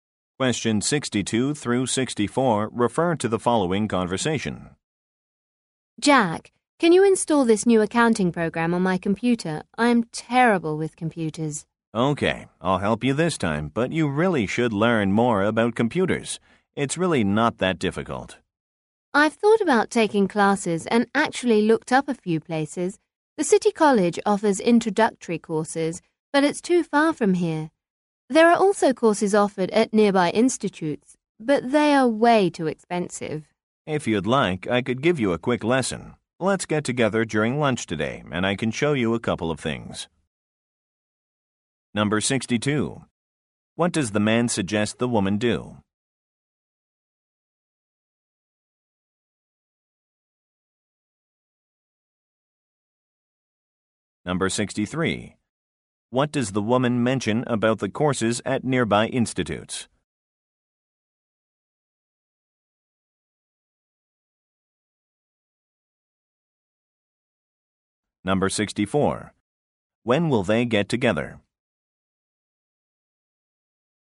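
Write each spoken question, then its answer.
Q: What does the man suggest the woman do?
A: Learn more about computers

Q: What does the woman mention about the courses at nearby institutes?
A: They are too expensive.

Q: When will they get together?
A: During lunch today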